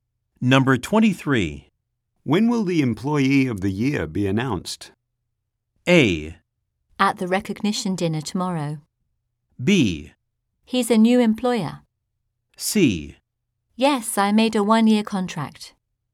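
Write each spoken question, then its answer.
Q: When will the Employee of the Year be announced?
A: A: At the recognition dinner tomorrow.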